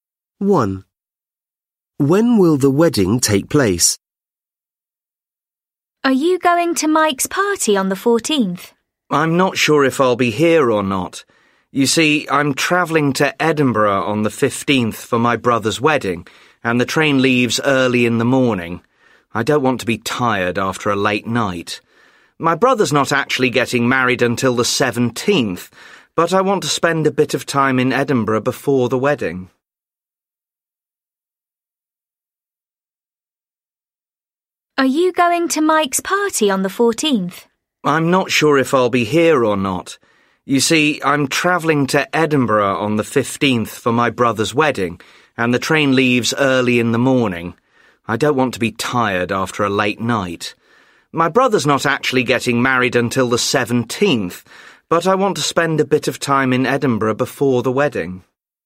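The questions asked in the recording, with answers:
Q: When will the wedding take place?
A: On the 17th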